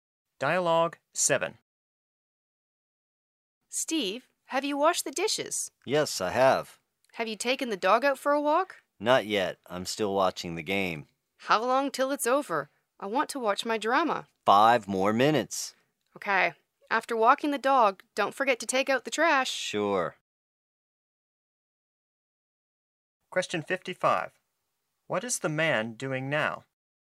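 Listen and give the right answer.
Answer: Watching the game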